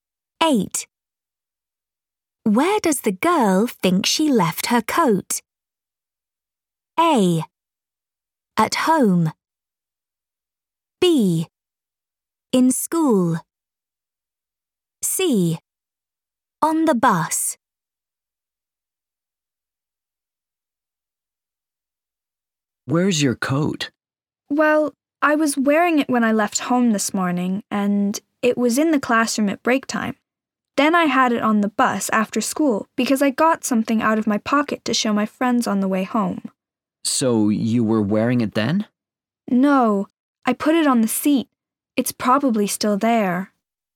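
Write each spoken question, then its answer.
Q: Where does the girl think she left her coat?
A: C: On the bus.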